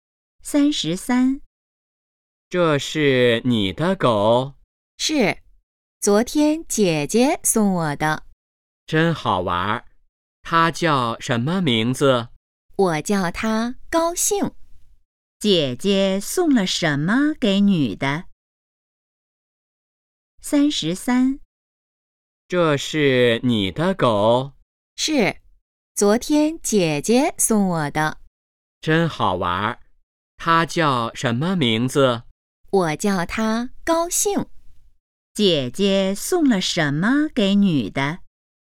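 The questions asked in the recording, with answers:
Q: 姐姐送了什么给女的?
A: 一只狗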